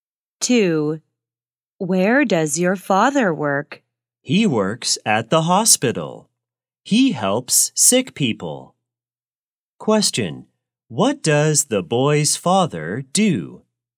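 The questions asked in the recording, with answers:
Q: What does the boy's father do?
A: He is a doctor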